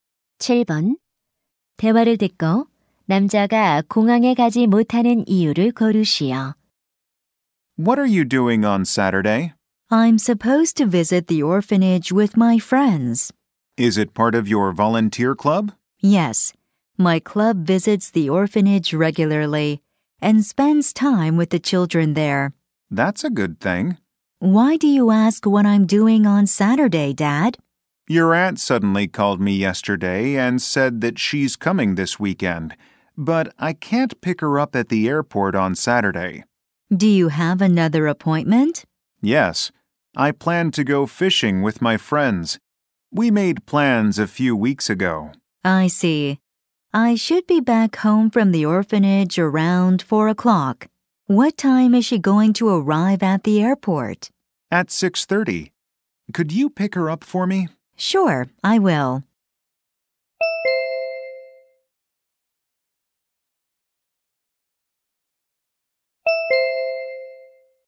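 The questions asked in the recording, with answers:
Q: 대화를 듣고 남자가 공항에 가지 못하는 이유를 고르시오.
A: 친구들과 낚시를 가기로 해서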